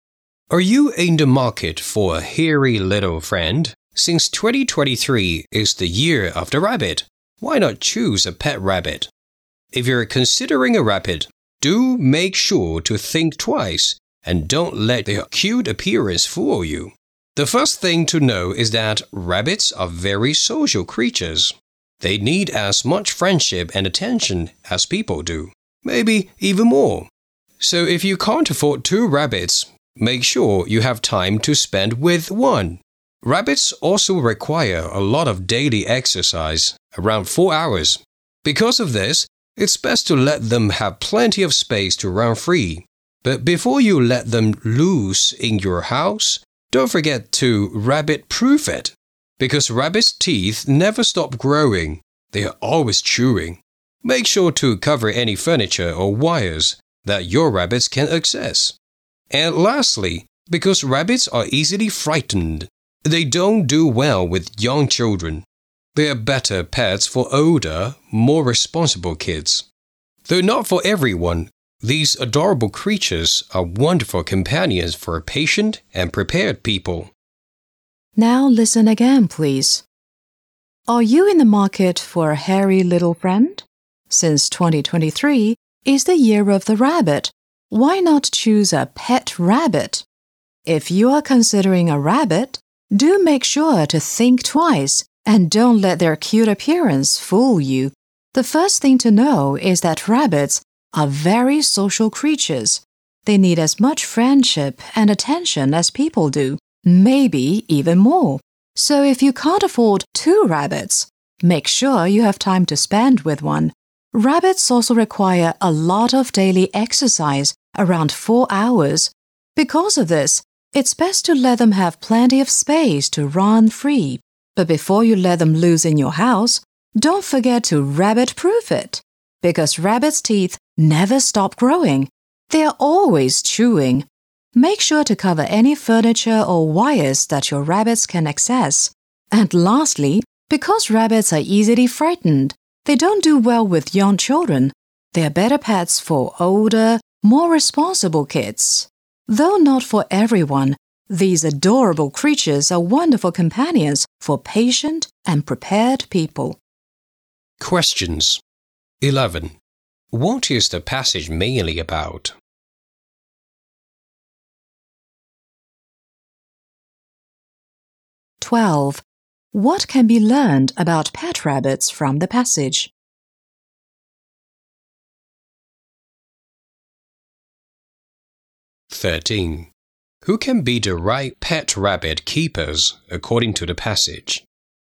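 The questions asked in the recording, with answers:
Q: What is the passage mainly about?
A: Things to consider before keeping a pet rabbit

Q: Who can be the right pet rabbit keepers according to the passage?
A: Patient and prepared people, such as older responsible kids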